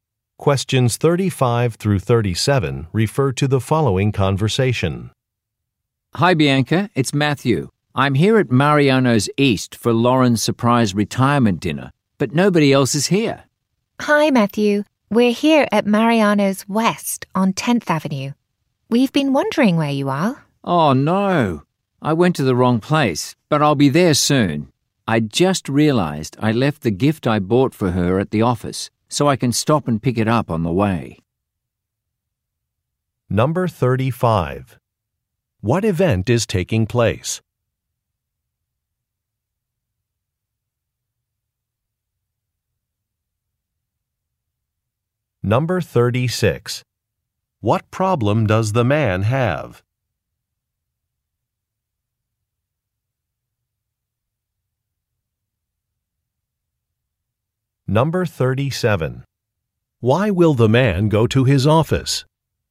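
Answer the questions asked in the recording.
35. A surprise retirement dinner
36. He went to the wrong restaurant location
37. To pick up a gift he left there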